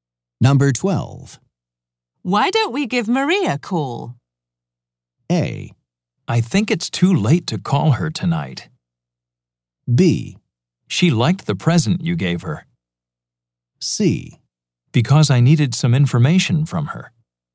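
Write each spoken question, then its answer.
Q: Why don't we give Maria a call?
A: A: I think it's too late to call her tonight.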